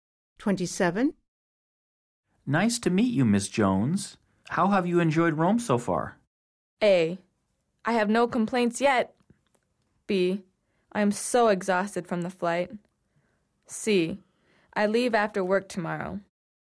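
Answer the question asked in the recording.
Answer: A: I have no complaints yet.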